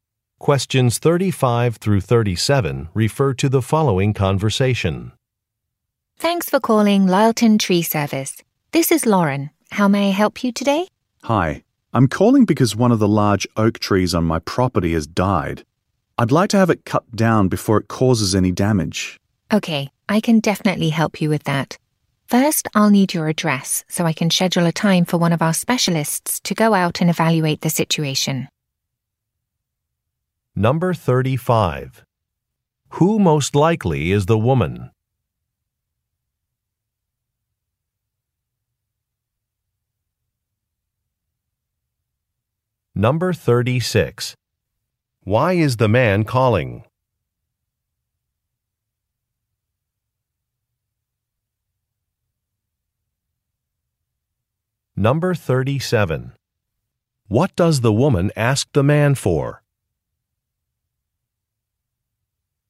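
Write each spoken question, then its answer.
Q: Who most likely is the woman?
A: A receptionist at a tree service

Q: Why is the man calling?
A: To have a dead tree cut down

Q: What does the woman ask the man for?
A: His address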